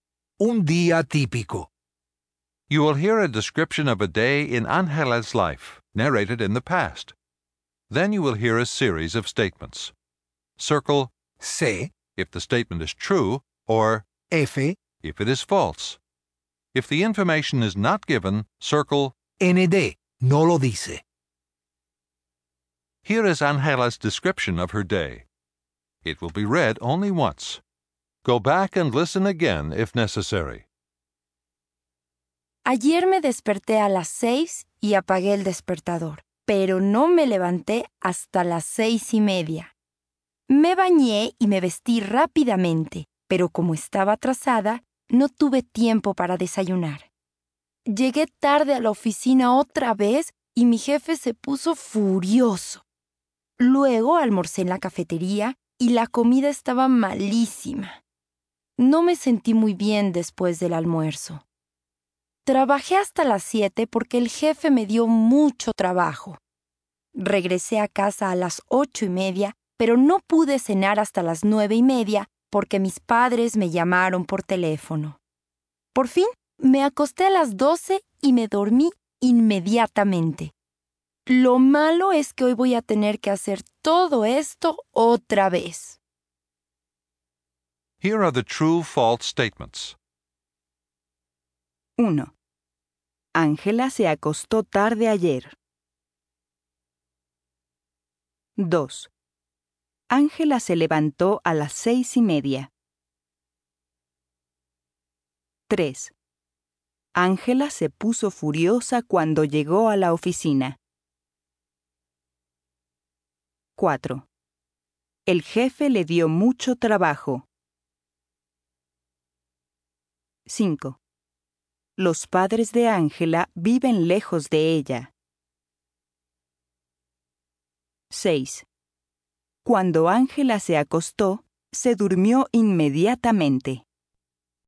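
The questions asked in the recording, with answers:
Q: Ángela se levantó a las 6:30.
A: C (cierto)

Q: Ángela se puso furiosa cuando llegó a la oficina.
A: F (falso)

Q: El jefe le dio mucho trabajo.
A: C (cierto)

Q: Los padres de Ángela viven lejos de ella.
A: ND (no lo dice)

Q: Cuando Ángela se acostó, se durmió inmediatamente.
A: C (cierto)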